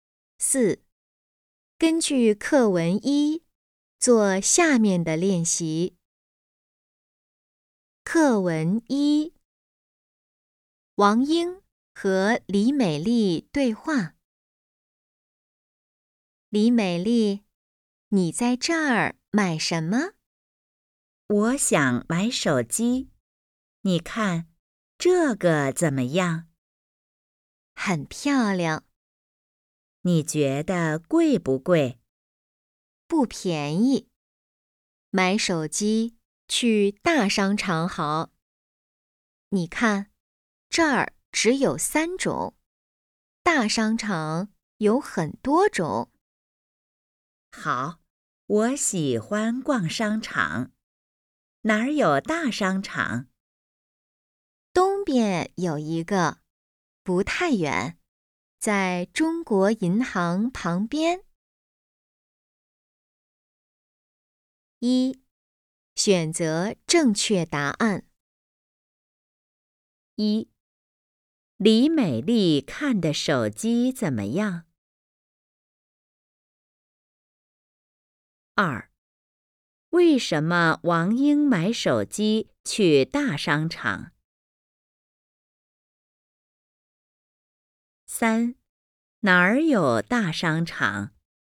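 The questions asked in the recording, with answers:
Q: 李美丽看的手机怎么样?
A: 很漂亮,但不便宜

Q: 为什么王英买手机去大商场?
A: 因为大商场有很多种手机,这儿只有三种

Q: 哪儿有大商场?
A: 东边,在中国银行旁边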